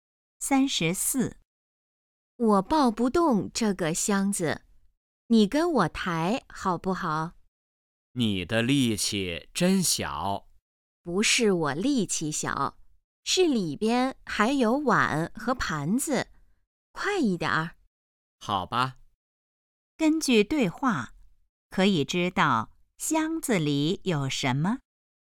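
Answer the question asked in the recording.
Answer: 碗和盘子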